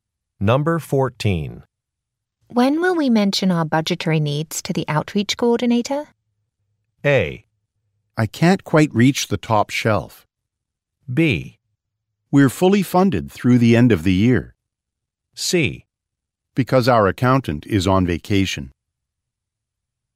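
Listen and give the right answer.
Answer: B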